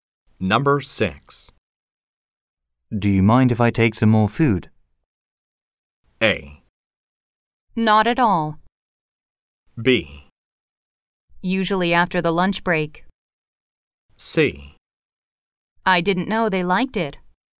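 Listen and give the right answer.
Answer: A: Not at all.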